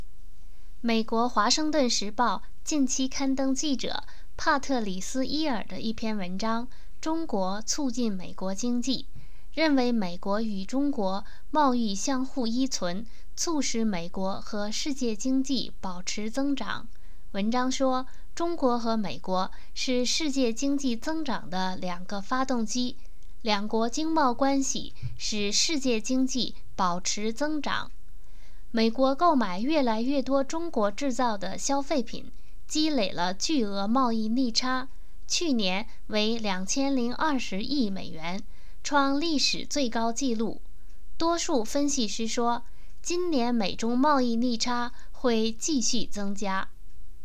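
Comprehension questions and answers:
Please answer the following questions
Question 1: What was the deficit in America's trade with China last year?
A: 202 billion US dollars, a record high

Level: M.Phil Year 2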